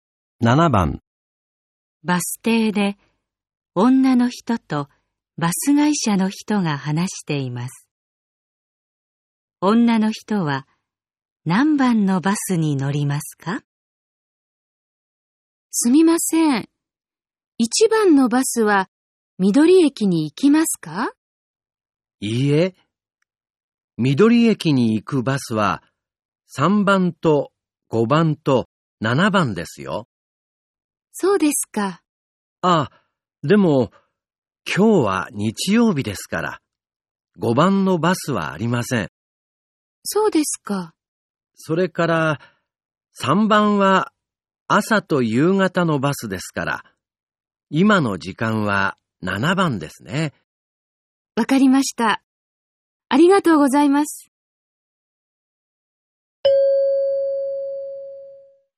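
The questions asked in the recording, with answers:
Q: 女の人は何番のバスに乗りますか?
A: 7番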